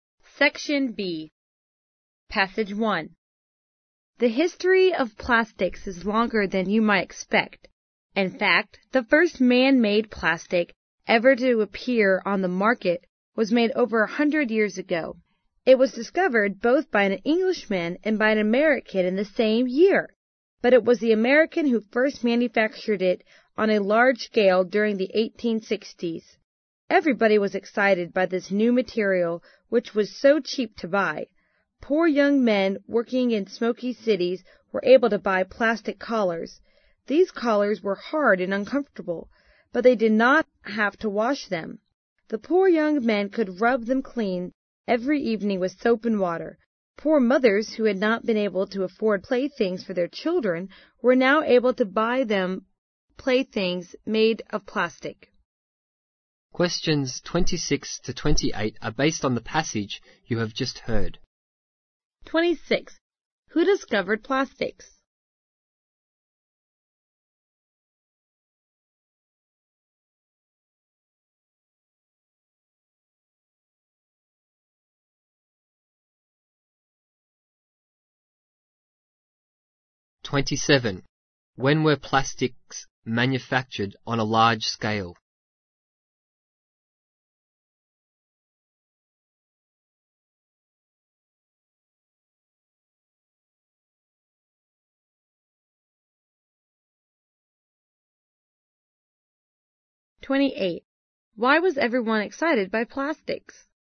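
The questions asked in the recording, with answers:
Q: Who discovered plastics?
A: An Englishman and an American

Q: When were plastics manufactured on a large scale?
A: During the 1860s

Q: Why was everyone excited by plastics?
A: They were cheap to buy.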